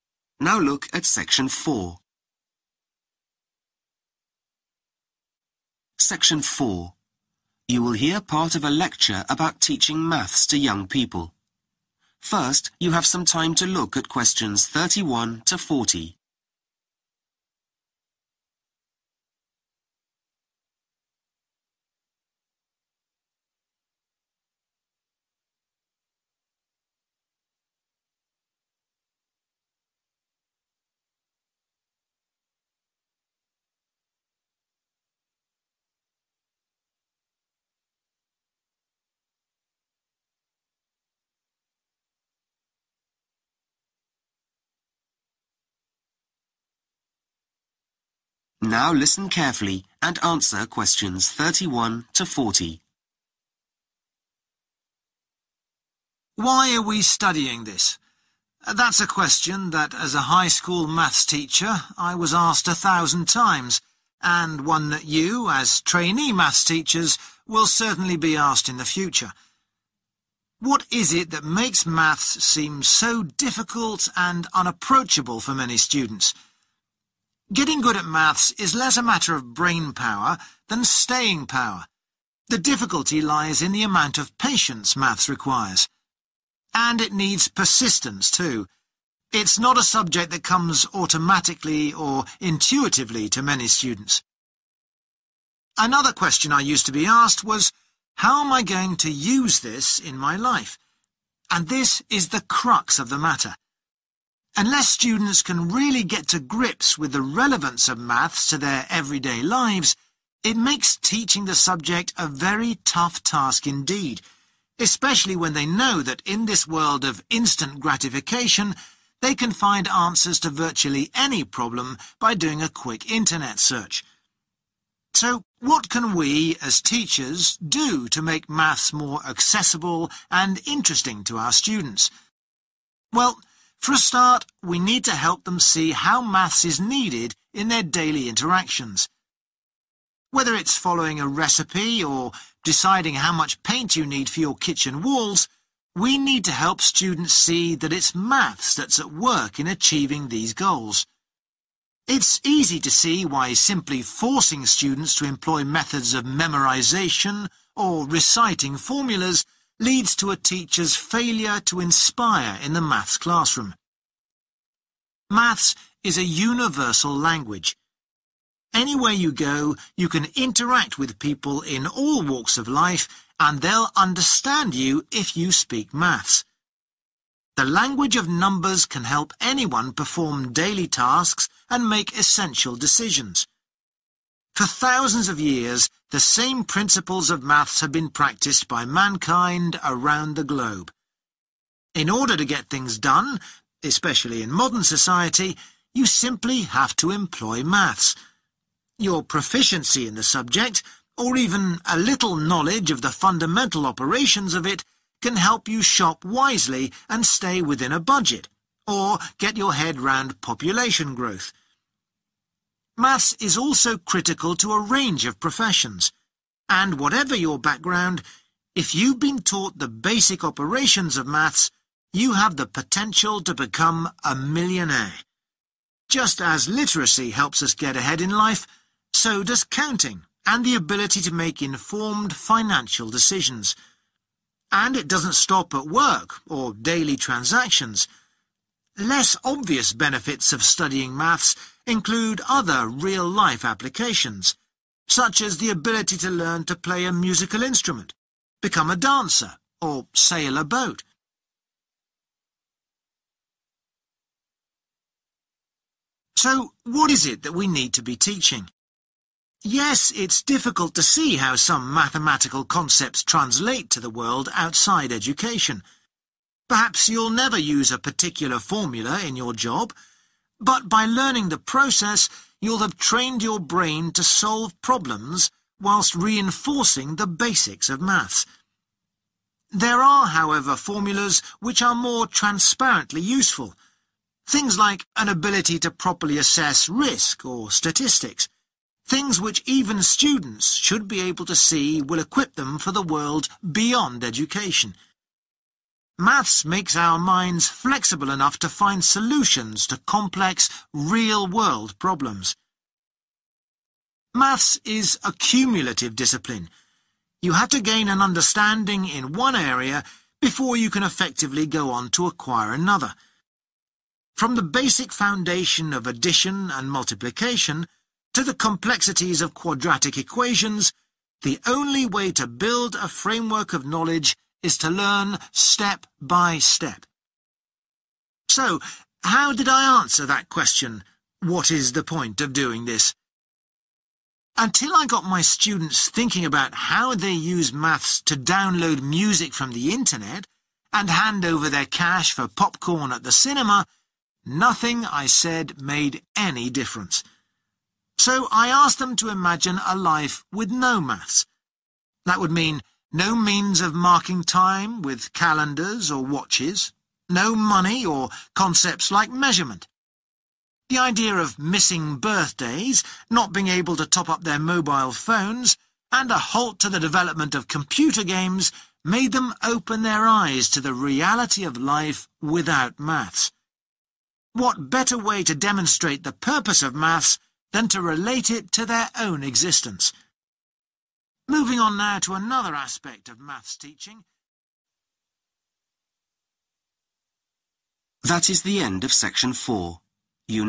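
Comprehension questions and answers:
Complete the sentences below. Write ONE WORD ONLY for each answer.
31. Students need and persistence to succeed in maths.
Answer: patience

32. Students also have a need to understand the of the subject.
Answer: relevance

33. It is the teacher's role to make maths accessible. Maths is in everything we do, from using a to decorating a room.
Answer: recipe

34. Teachers should avoid using techniques involving or repetition.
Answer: memorization

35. People have applied similar for many generations.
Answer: principles

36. Basic maths skills help us stick to a or understand trends.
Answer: budget

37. Maths is essential in progressing our careers, much like skills.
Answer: literacy

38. It is also useful in hobbies like music or sailing. Students find it hard to see how maths relates to life outside school: studying risk assessment or makes this easier. 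Maths also helps us to find solutions to difficult life problems.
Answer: statistics

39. The way to study maths is to start from a of simple ideas and build up to more complex ones.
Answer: foundation

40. What teachers can do to help students see the point of maths; ask them to imagine life without calendars, watches, money or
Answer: measurement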